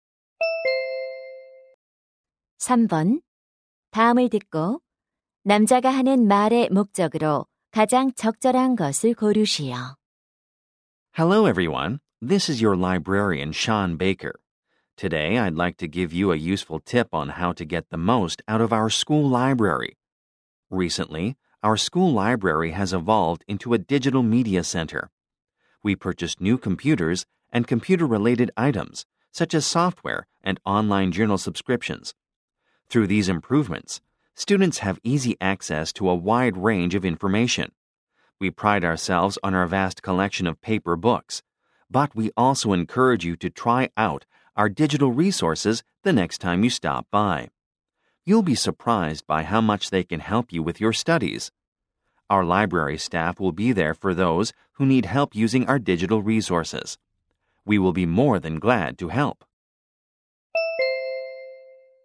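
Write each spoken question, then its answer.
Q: 다음을 듣고 남자가 하는 말의 목적으로 가장 적절한 것을 고르시오.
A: 학교 도서관의 디지털 자료 이용을 권장하려고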